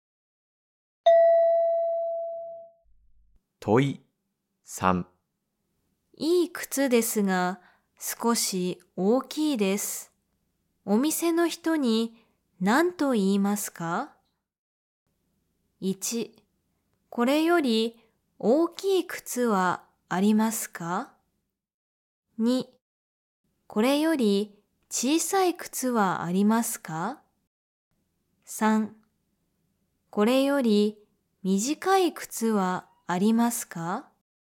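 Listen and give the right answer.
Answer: 2: これより小さい靴はありますか?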